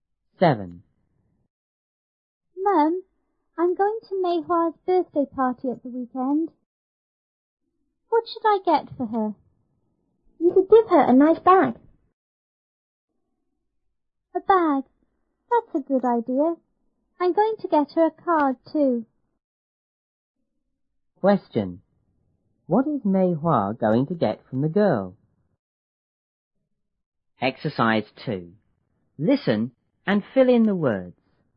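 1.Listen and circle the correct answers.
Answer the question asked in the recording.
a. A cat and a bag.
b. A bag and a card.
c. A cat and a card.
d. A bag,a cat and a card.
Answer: b. A bag and a card.

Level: 初中英语广州版1B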